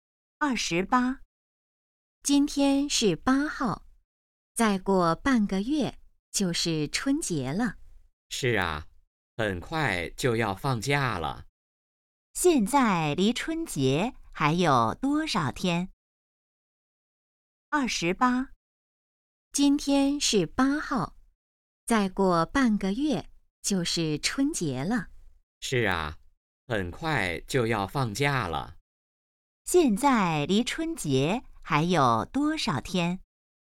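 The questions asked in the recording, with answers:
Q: 现在离春节还有多少天?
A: 十五天(半个月)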